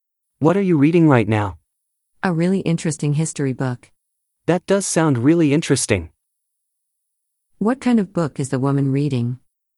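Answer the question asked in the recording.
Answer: A history book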